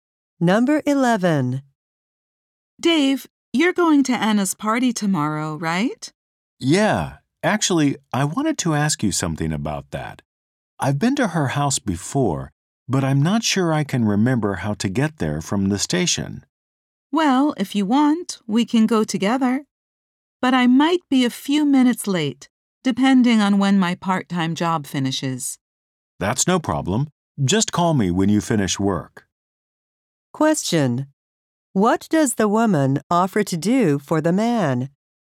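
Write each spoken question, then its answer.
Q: What does the woman offer to do for the man?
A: Go to Anna's party with him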